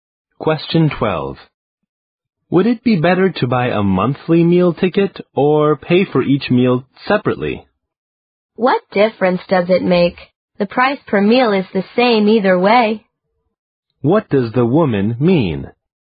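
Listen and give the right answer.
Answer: It makes no difference; the price per meal is the same either way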